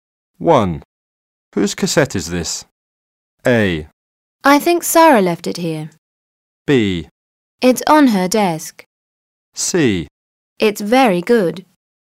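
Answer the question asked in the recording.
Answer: A: I think Sarah left it here.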